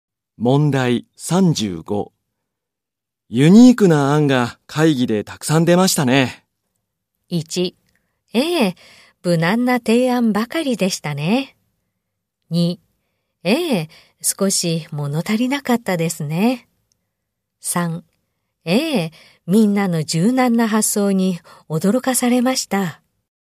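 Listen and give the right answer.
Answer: 3: ええ、みんなの柔軟な発想に驚かされました。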